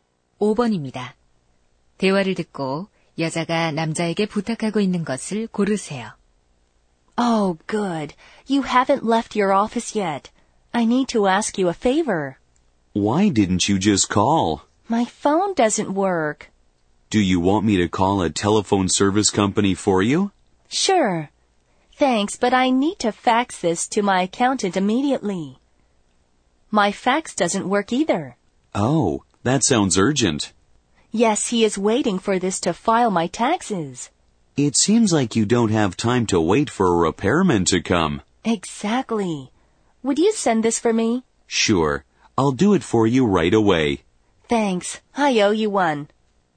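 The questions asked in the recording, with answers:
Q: 대화를 듣고 여자가 남자에게 부탁하고 있는 것을 고르세요.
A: 회계사에게 팩스 보내 주기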